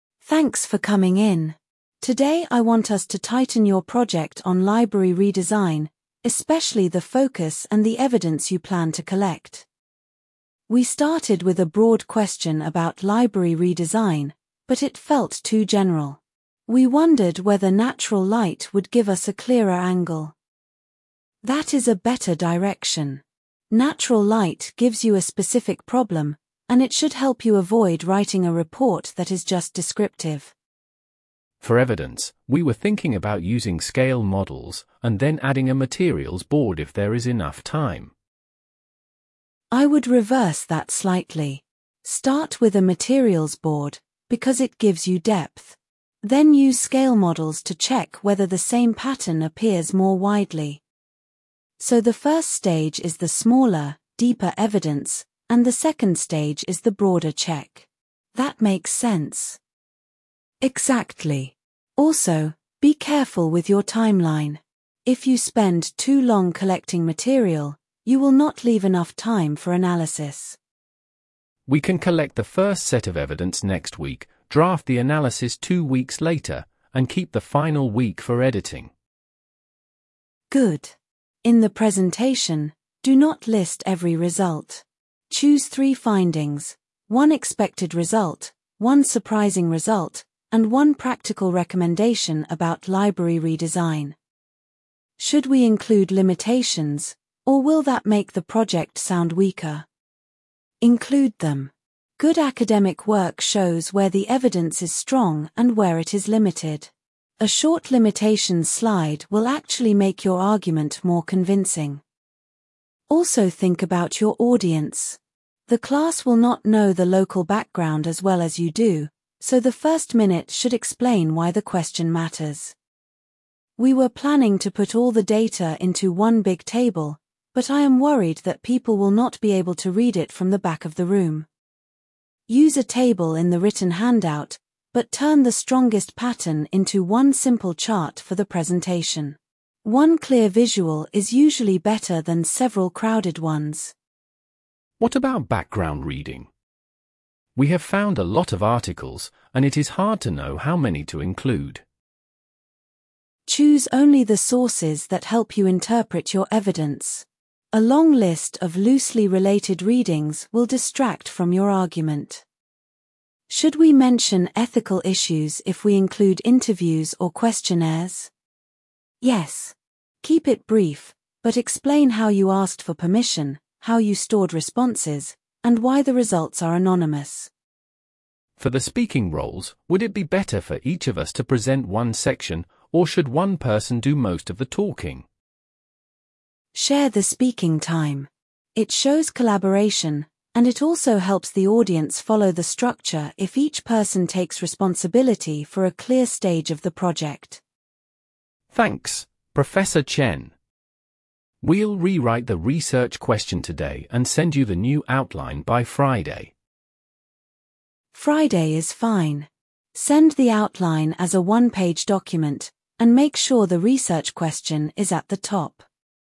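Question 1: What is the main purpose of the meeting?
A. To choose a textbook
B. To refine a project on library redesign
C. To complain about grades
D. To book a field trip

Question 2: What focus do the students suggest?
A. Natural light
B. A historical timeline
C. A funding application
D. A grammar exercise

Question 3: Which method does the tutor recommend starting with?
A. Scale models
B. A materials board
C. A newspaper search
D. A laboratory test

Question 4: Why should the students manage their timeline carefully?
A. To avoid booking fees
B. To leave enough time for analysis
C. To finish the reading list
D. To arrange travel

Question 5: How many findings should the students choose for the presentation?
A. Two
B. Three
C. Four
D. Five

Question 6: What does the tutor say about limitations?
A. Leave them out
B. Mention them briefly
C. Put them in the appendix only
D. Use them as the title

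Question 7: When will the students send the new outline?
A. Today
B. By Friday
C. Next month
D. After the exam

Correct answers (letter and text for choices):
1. B. To refine a project on library redesign
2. A. Natural light
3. B. A materials board
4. B. To leave enough time for analysis
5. B. Three
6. B. Mention them briefly
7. B. By Friday

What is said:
Tutor: Thanks for coming in. Today I want us to tighten your project on library redesign, especially the focus and the evidence you plan to collect.
Student A: We started with a broad question about library redesign, but it felt too general. We wondered whether natural light would give us a clearer angle.
Tutor: That is a better direction. Natural light gives you a specific problem, and it should help you avoid writing a report that is just descriptive.
Student B: For evidence, we were thinking about using scale models, and then adding a materials board if there is enough time.
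Tutor: I would reverse that slightly. Start with a materials board, because it gives you depth. Then use scale models to check whether the same pattern appears more widely.
Student A: So the first stage is the smaller, deeper evidence, and the second stage is the broader check. That makes sense.
Tutor: Exactly. Also, be careful with your timeline. If you spend too long collecting material, you will not leave enough time for analysis.
Student B: We can collect the first set of evidence next week, draft the analysis two weeks later, and keep the final week for editing.
Tutor: Good. In the presentation, do not list every result. Choose three findings: one expected result, one surprising result, and one practical recommendation about library redesign.
Student A: Should we include limitations, or will that make the project sound weaker?
Tutor: Include them. Good academic work shows where the evidence is strong and where it is limited. 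A short limitations slide will actually make your argument more convincing.
Tutor: Also think about your audience. The class will not know the local background as well as you do, so the first minute should explain why the question matters.
Student A: We were planning to put all the data into one big table, but I am worried that people will not be able to read it from the back of the room.
Tutor: Use a table in the written handout, but turn the strongest pattern into one simple chart for the presentation. One clear visual is usually better than several crowded ones.
Student B: What about background reading? We have found a lot of articles, and it is hard to know how many to include.
Tutor: Choose only the sources that help you interpret your evidence. A long list of loosely related readings will distract from your argument.
Student A: Should we mention ethical issues if we include interviews or questionnaires?
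Tutor: Yes. Keep it brief, but explain how you asked for permission, how you stored responses, and why the results are anonymous.
Student B: For the speaking roles, would it be better for each of us to present one section, or should one person do most of the talking?
Tutor: Share the speaking time. It shows collaboration, and it also helps the audience follow the structure if each person takes responsibility for a clear stage of the project.
Student B: Thanks, Professor Chen. We'll rewrite the research question today and send you the new outline by Friday.
Tutor: Friday is fine. Send the outline as a one-page document, and make sure the research question is at the top.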